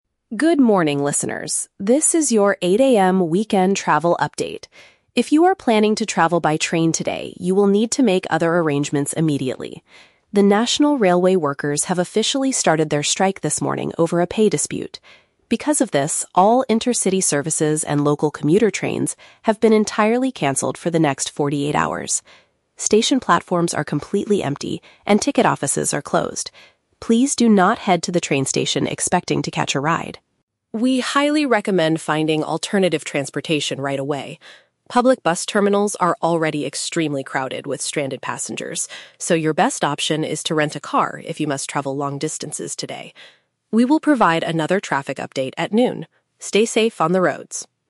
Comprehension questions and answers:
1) What is the main topic of this news report?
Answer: A work stoppage by train employees.

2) How long will the train services be unavailable?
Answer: For two days.

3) What does the reporter advise travelers to do?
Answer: Hire a personal vehicle for long trips.

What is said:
Reporter: Good morning, listeners. This is your 8 AM weekend travel update. If you are planning to travel by train today, you will need to make other arrangements immediately. The national railway workers have officially started their strike this morning over a pay dispute. Because of this, all intercity services and local commuter trains have been entirely cancelled for the next 48 hours. Station platforms are completely empty, and ticket offices are closed. Please do not head to the train station expecting to catch a ride.
We highly recommend finding alternative transportation right away. Public bus terminals are already extremely crowded with stranded passengers, so your best option is to rent a car if you must travel long distances today. We will provide another traffic update at noon. Stay safe on the roads!